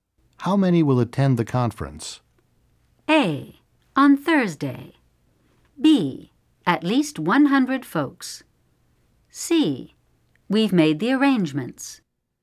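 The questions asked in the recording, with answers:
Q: How many will attend the conference?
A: B: At least 100 folks.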